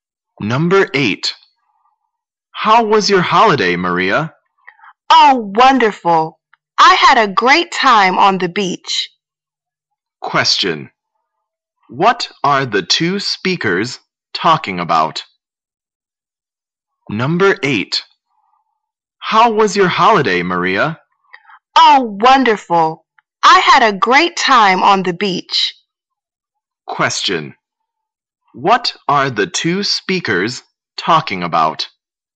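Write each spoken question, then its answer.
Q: What are the two speakers talking about?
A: Maria's holiday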